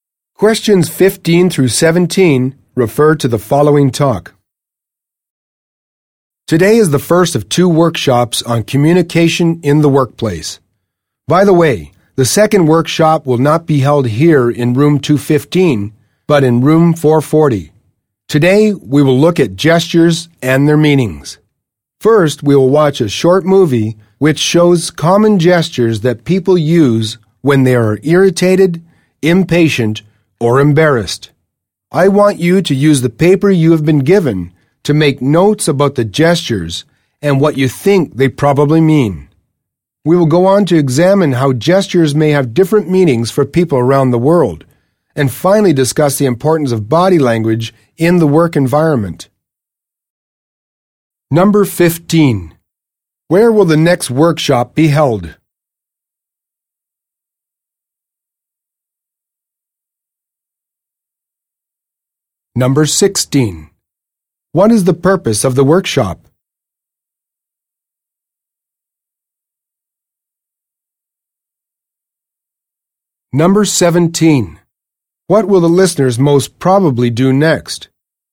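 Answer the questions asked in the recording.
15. In room 440
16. To learn about communication in the workplace (gestures and their meanings)
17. Watch a short movie about gestures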